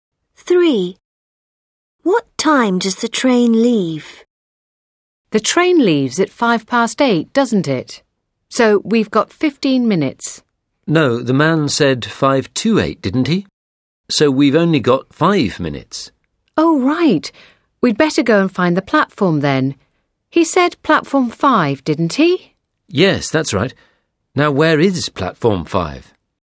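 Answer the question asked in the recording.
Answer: 8:05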